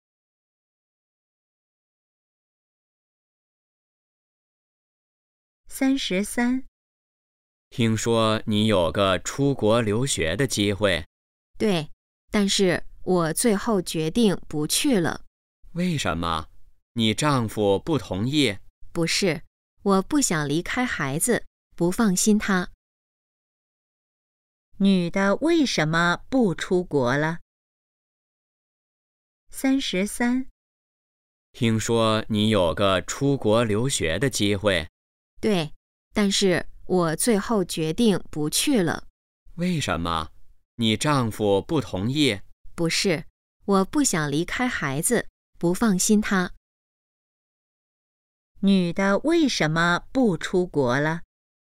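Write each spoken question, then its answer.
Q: 女的为什么不出国了?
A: 不想离开孩子,不放心他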